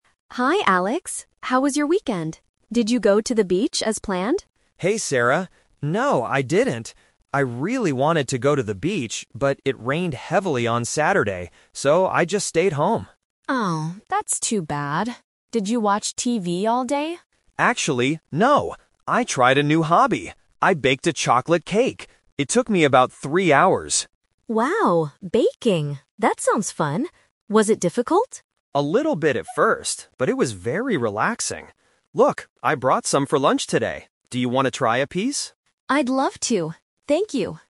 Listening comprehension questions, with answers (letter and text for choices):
Listen to two colleagues talking during their lunch break. Choose the correct answer (A, B, or C).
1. Why didn't Alex go to the beach?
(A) Because he was too tired.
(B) Because it rained heavily.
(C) Because he wanted to bake a cake.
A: (B) Because it rained heavily.

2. What did Alex do at home on Saturday?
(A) He watched TV all day.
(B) He baked a chocolate cake.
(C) He bought some lunch.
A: (B) He baked a chocolate cake.

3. What does Alex ask Sarah to do at the end of the conversation?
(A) Taste the cake he made.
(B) Bake a cake with him.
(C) Go to the beach tomorrow.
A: (A) Taste the cake he made.

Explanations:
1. Alex explains his change of plans clearly: "...but it rained heavily on Saturday. So, I just stayed home."
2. Alex says directly, "I tried a new hobby. I baked a chocolate cake!"
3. Alex offers the cake he brought to work by asking: "Do you want to try a piece?"

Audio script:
Sarah: Hi Alex. How was your weekend? Did you go to the beach as planned?
Alex: Hey Sarah. No, I didn't. I really wanted to go to the beach, but it rained heavily on Saturday. So, I just stayed home.
Sarah: Oh, that's too bad. Did you watch TV all day?
Alex: Actually, no. I tried a new hobby. I baked a chocolate cake! It took me about three hours.
Sarah: Wow, baking! That sounds fun. Was it difficult?
Alex: A little bit at first, but it was very relaxing. Look, I brought some for lunch today. Do you want to try a piece?
Sarah: I'd love to! Thank you.